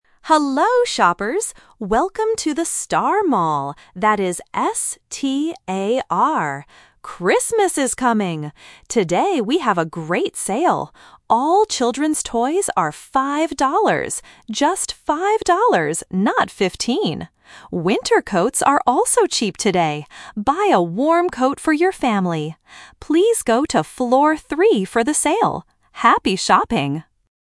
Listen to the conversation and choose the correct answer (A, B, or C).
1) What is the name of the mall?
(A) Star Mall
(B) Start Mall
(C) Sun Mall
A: Star Mall

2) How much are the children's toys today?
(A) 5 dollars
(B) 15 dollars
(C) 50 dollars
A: 5 dollars

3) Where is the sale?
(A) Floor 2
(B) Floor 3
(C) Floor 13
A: Floor 3

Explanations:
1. The announcer says, "Welcome to the Star Mall" and spells it clearly: "S-T-A-R". Trap: Option (B) is a sound-alike trap ("Start" sounds like "Star"). Option (C) is a plausible name but is not mentioned.
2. The announcer says, "All children's toys are 5 dollars." Trap: Option (B) is a trap because the announcer mentions "15" but says "not 15". Option (C) is a classic A1 distractor (confusing 15 and 50).
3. The announcer clearly says, "Please go to Floor 3 for the sale." Trap: Option (C) is a trap because "13" (thirteen) sounds similar to "3" (three) for beginners. Option (A) is not mentioned.

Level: A1

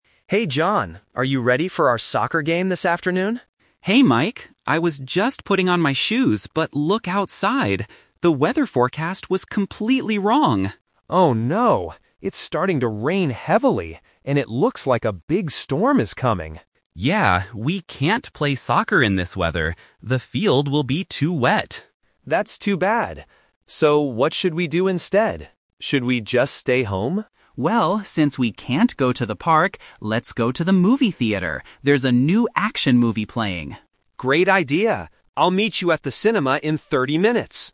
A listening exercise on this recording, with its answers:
Listen to the conversation and choose the correct answer (A, B, or C).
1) What did the friends initially plan to do this afternoon?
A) Go for a run in the park.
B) Watch an action movie.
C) Play soccer.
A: Play soccer.

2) Why do they have to change their plan?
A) Because it is raining heavily.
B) Because John wants to stay home.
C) Because John lost his shoes.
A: Because it is raining heavily.

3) What is their final decision?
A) They will stay home.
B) They will go to the cinema.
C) They will play soccer in the rain.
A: They will go to the cinema.

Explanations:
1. Mike asks at the beginning, "are you ready for our soccer game this afternoon?". Option (B) is the trap because watching a movie is what they decide to do at the end, not their initial plan. Option (A) is a trap because the park is mentioned ("we can't go to the park"), but running is never mentioned.
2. Mike says, "it's starting to rain heavily," and John agrees they can't play soccer in this weather. Option (B) is a trap because Mike asks, "Should we just stay home?", but John suggests going out to the movies instead. Option (C) is a trap because John mentions "putting on my shoes," not losing them.
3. John suggests, "let's go to the movie theater," and Mike agrees to meet him "at the cinema". Option (A) is the trap because staying home was mentioned by Mike as an idea but quickly rejected. Option (C) is entirely rejected by both speakers.

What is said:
Mike: Hey John, are you ready for our soccer game this afternoon?
John: Hey Mike. I was just putting on my shoes, but look outside! The weather forecast was completely wrong.
Mike: Oh no, it's starting to rain heavily. And it looks like a big storm is coming.
John: Yeah. We can't play soccer in this weather. The field will be too wet.
Mike: That's too bad. So, what should we do instead? Should we just stay home?
John: Well, since we can't go to the park, let's go to the movie theater. There's a new action movie playing.

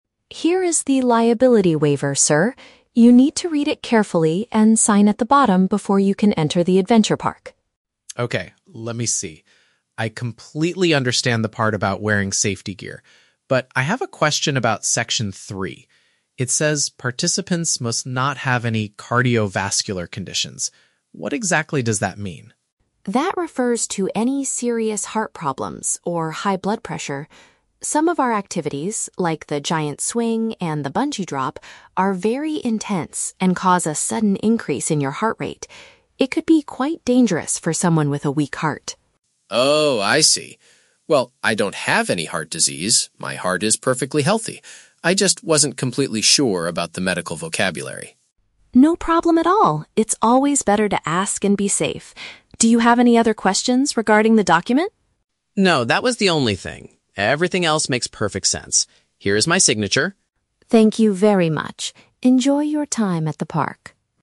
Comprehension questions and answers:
Listen to the conversation between a customer and a theme park staff member. Choose the correct answer (A, B, or C) for each question.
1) Why does the customer hesitate to sign the document at first?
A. He refuses to wear the heavy safety equipment provided by the park.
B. He is suffering from a serious illness and is worried about the danger.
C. He wants to clarify the meaning of a specific health-related word.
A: He wants to clarify the meaning of a specific health-related word.

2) According to the staff, why is the health rule necessary?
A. Because the extreme rides can make a person's heart beat very fast.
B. Because the park's insurance company will not pay for any injuries.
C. Because the local hospital is located too far away from the adventure park.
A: Because the extreme rides can make a person's heart beat very fast.

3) What does the customer do at the end of the conversation?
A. He decides to cancel his ticket and leave the adventure park immediately.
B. He successfully finishes filling out the mandatory legal paperwork.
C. He asks to call a medical doctor before going on the giant swing.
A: He successfully finishes filling out the mandatory legal paperwork.

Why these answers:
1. The customer asks, "What exactly does that mean?" because he "wasn't completely sure about the medical vocabulary." This perfectly matches option C: clarifying the meaning of a specific health-related word. Why the traps are wrong: Option A is a trap; he explicitly says, "I completely understand the part about wearing safety gear." Option B is a trap; the audio mentions "heart disease," but the customer says he doesn't have any ("my heart is perfectly healthy").
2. The staff explains that the intense activities "cause a sudden increase in your heart rate." An increase in heart rate means making a person's heart beat very fast. Why the traps are wrong: Options B and C are very logical and common real-world reasons for waivers and health rules, but they are completely made up and never mentioned in the audio script.
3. After getting his answer, the customer says, "Here is my signature." Providing a signature means he finishes filling out the mandatory legal paperwork (the waiver). Why the traps are wrong: Option A is incorrect because he signs the paper to enter the park, he doesn't leave. Option C is a trap using the words "doctor/medical" and "giant swing" from the context, but he never asks to call a doctor.

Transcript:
Staff: Here is the liability waiver, sir. You need to read it carefully and sign at the bottom before you can enter the adventure park.
Customer: Okay, let me see... I completely understand the part about wearing safety gear. But I have a question about section three. It says participants must not have any "cardiovascular conditions." What exactly does that mean?
Staff: That refers to any serious heart problems or high blood pressure. Some of our activities, like the giant swing and the bungee drop, are very intense and cause a sudden increase in your heart rate. It could be quite dangerous for someone with a weak heart.
Customer: Oh, I see. Well, I don't have any heart disease; my heart is perfectly healthy. I just wasn't completely sure about the medical vocabulary.
Staff: No problem at all! It's always better to ask and be safe. Do you have any other questions regarding the document?
Customer: No, that was the only thing. Everything else makes perfect sense.

